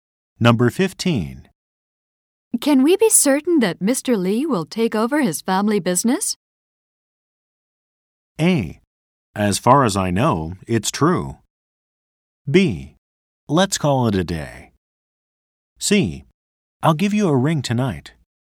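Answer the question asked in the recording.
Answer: A: As far as I know, it's true.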